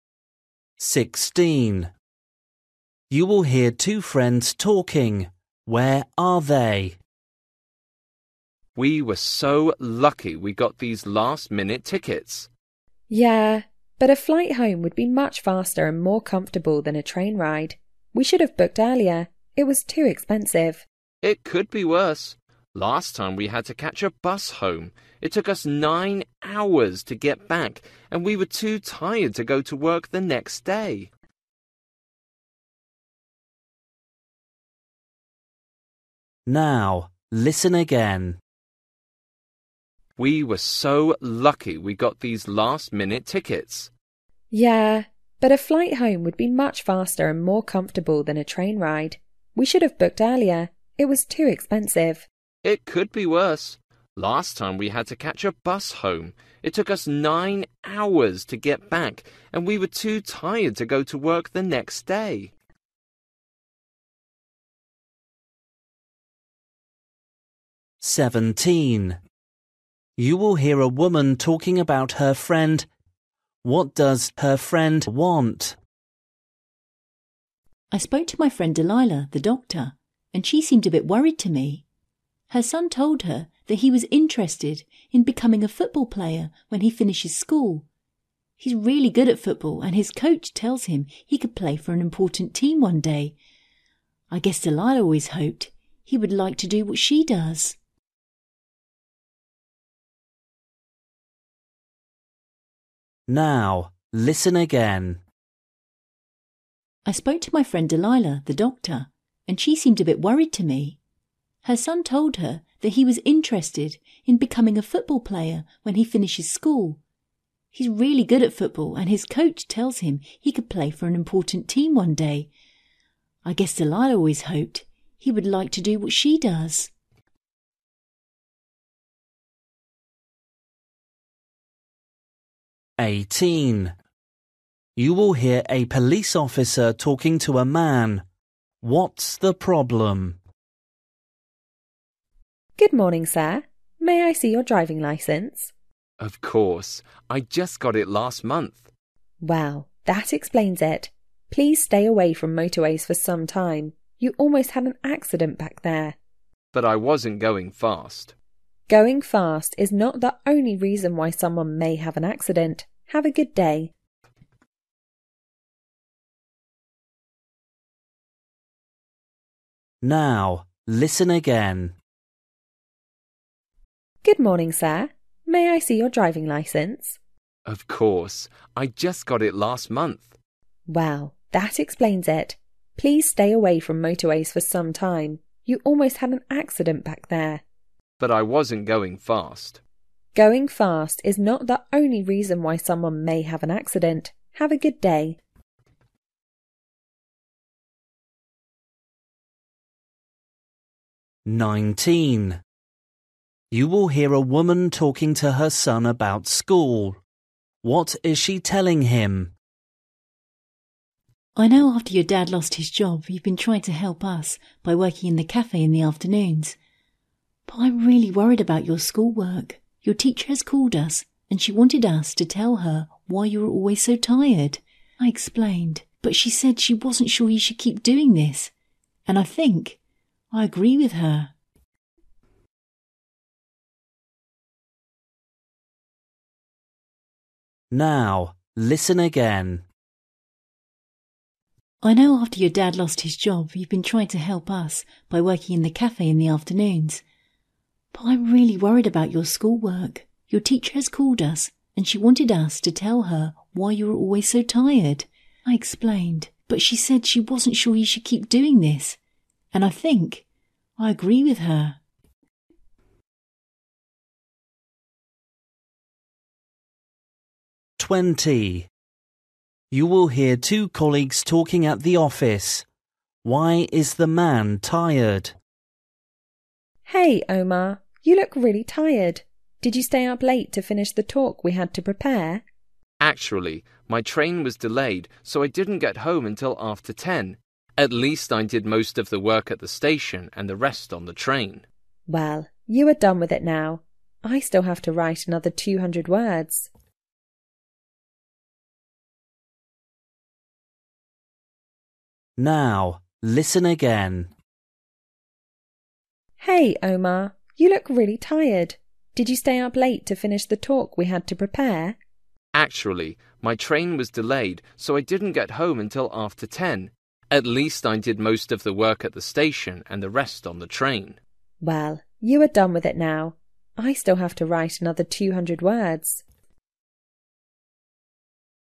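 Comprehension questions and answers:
For each question, choose the correct answer.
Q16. You will hear two friends talking. Where are they?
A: On a train

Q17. You will hear a woman talking about her friend. What does her friend want?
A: She wants her son to become a doctor like her

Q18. You will hear a police officer talking to a man. What's the problem?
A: The man is a new driver and almost had an accident

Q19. You will hear a woman talking to her son about school. What is she telling him?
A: He should stop working in the cafe because his schoolwork is suffering

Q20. You will hear two colleagues talking at the office. Why is the man tired?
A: His train was delayed so he got home late

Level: Luyện nghe trình độ A2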